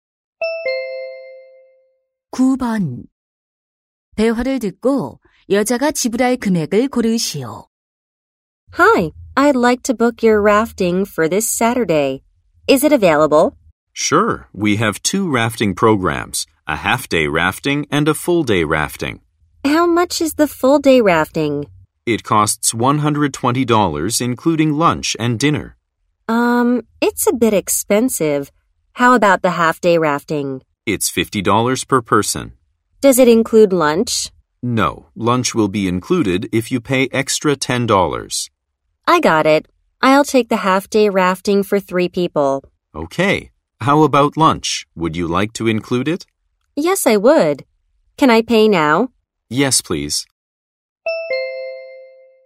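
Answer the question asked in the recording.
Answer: $180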